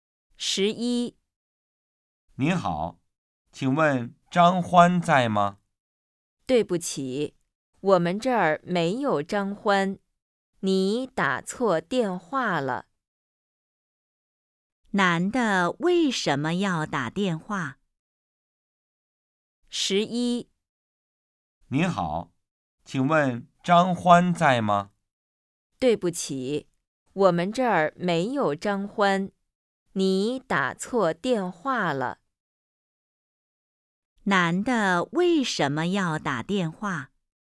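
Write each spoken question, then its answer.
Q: 男的为什么要打电话?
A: 找张欢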